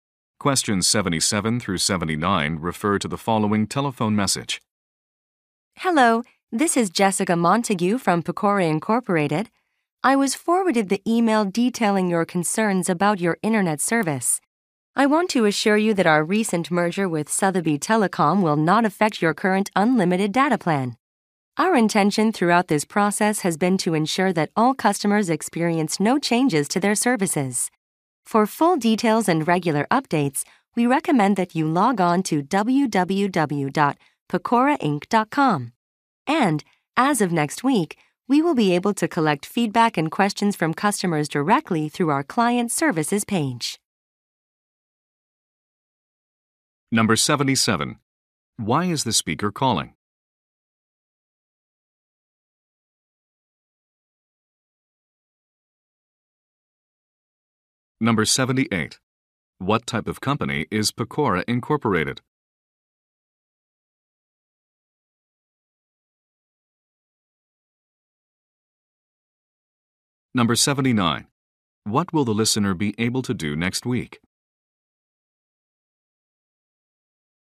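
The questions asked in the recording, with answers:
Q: Why is the speaker calling?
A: To respond to a customer's concerns about internet service after a merger

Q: What type of company is Pecora Incorporated?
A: An internet/telecommunications provider

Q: What will the listener be able to do next week?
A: Submit feedback and questions through the client services page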